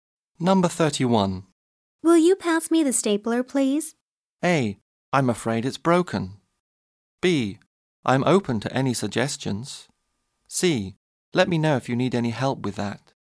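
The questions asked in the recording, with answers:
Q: Will you pass me the stapler, please?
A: A: I'm afraid it's broken.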